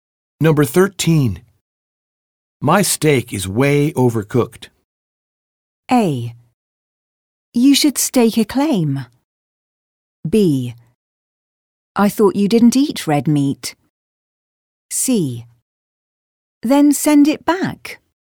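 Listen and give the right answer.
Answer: C: Then send it back.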